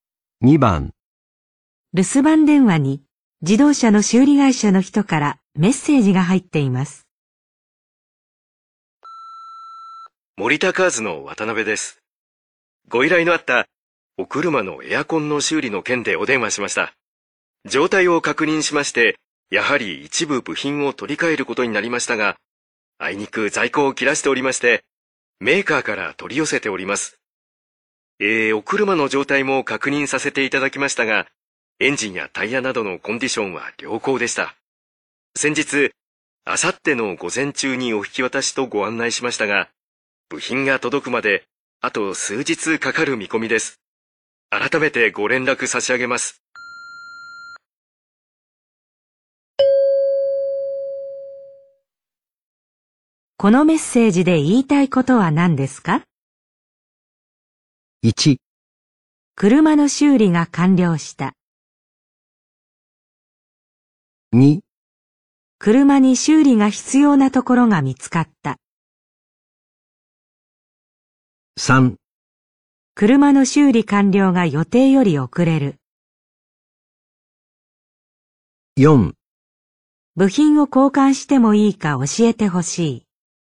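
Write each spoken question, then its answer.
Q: このメッセージで言いたいことは何ですか?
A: 3: 車の修理完了が予定より遅れる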